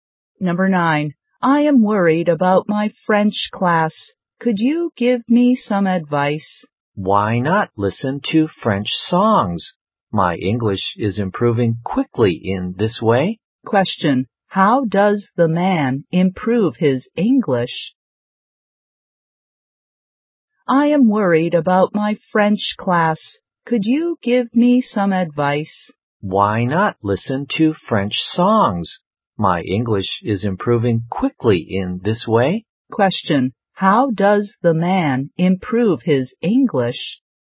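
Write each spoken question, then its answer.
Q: How does the man improve his English?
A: By listening to songs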